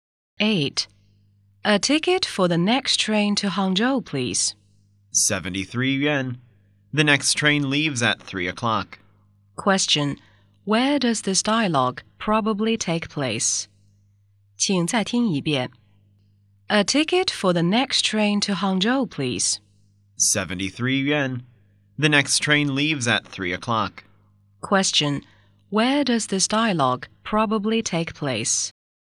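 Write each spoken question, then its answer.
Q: Where does this dialogue probably take place?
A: At a train station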